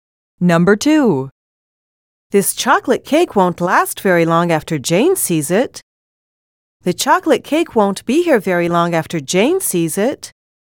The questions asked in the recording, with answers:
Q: This chocolate cake won't last very long after Jane sees it. The chocolate cake won't be here very long after Jane sees it.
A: Same is the correct answer.